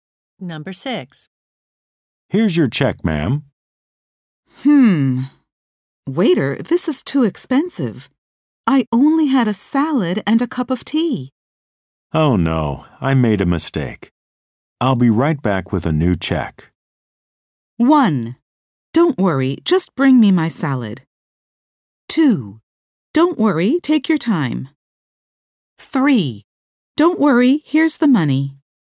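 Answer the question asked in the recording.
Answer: 2: Don't worry, take your time.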